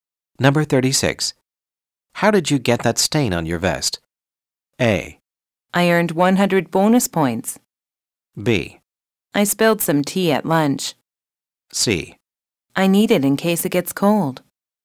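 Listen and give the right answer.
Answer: B: I spilled some tea at lunch.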